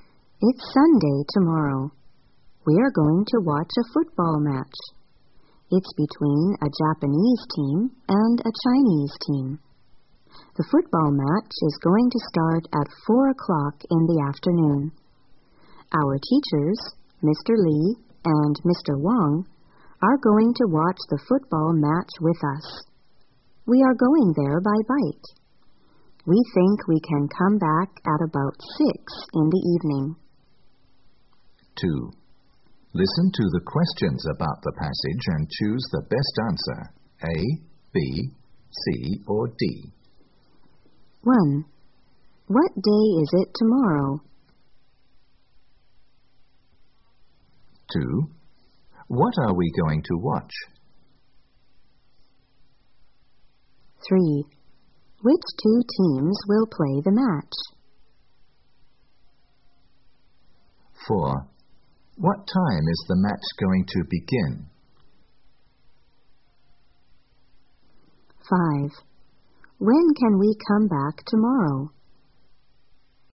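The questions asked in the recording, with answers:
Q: What day is it tomorrow?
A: Sunday

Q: What are we going to watch?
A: A football match

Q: Which two teams will play the match?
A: A Japanese team and a Chinese team

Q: What time is the match going to begin?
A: At 4 o'clock in the afternoon

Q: When can we come back tomorrow?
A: At about 6 in the evening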